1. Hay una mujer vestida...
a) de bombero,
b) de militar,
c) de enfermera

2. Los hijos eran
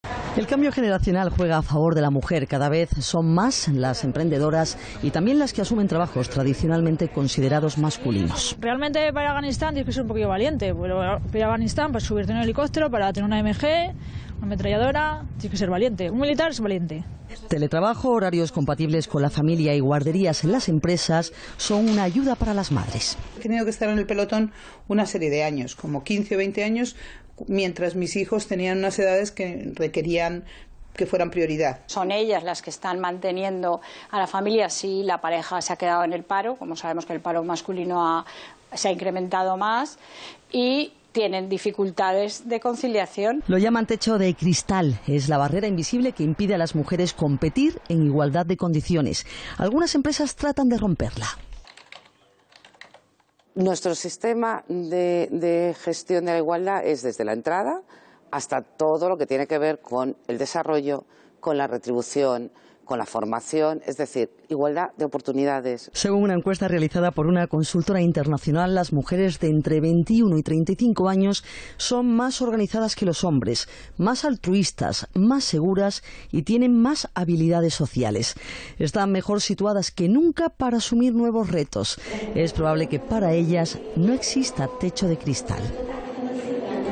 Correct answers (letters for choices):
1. b
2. prioridad